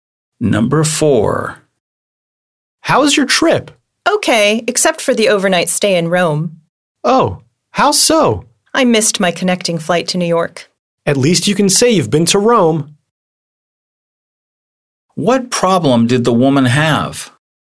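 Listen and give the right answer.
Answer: She missed her connecting flight to New York and had to stay overnight in Rome.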